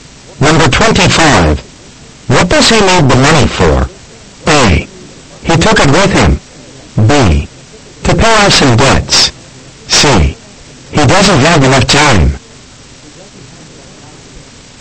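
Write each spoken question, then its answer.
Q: What does he need the money for?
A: B: To pay off some debts.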